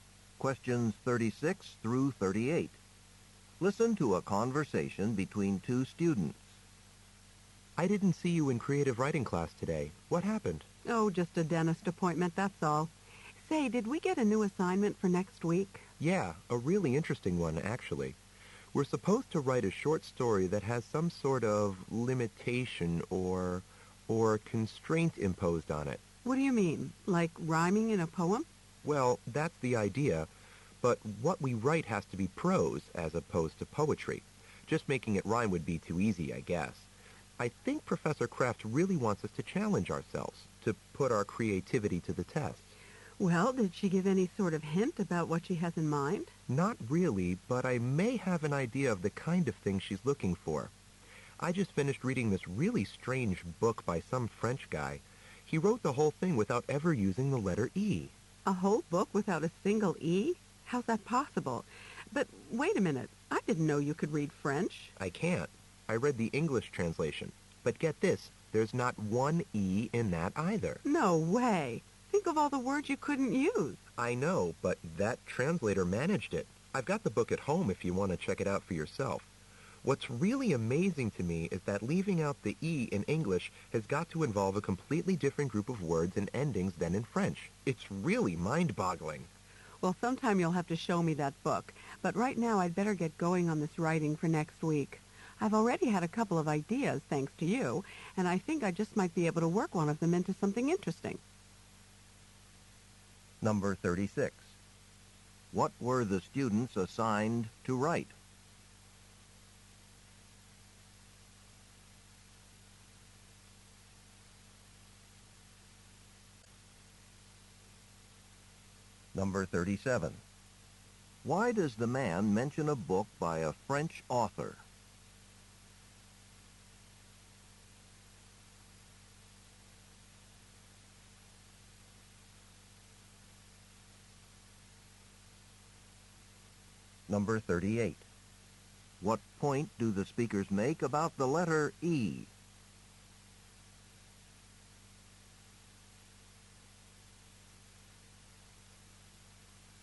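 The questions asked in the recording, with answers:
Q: What were the students assigned to write?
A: A short prose story with a constraint on it

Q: Why does the man mention a book by a French author?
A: As an example of writing with a constraint (no letter E)

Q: What point do the speakers make about the letter E?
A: Leaving it out in English needs different words than in French, so the translation is impressive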